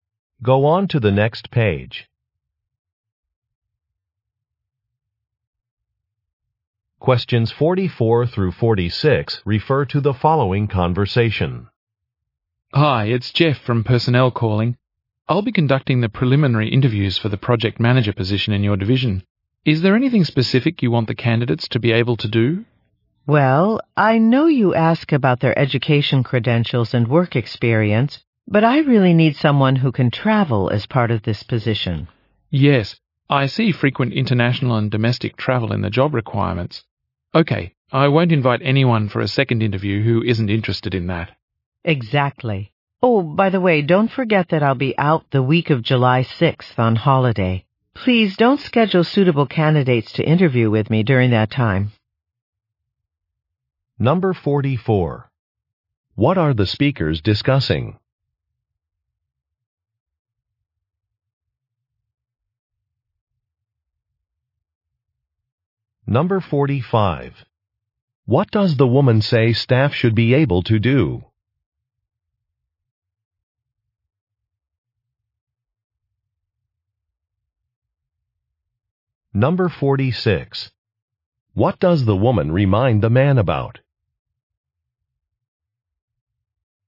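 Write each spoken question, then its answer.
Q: What are the speakers discussing?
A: Interviewing candidates for a project manager position

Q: What does the woman say staff should be able to do?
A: Travel

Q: What does the woman remind the man about?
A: She will be on holiday the week of July 6th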